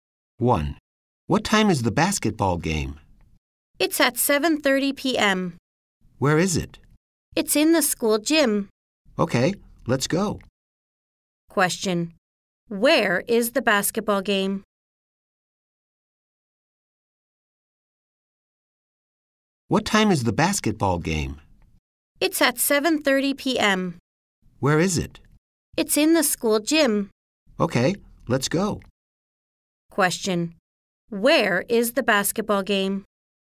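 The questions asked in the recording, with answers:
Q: where is the basketball game?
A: In the school gym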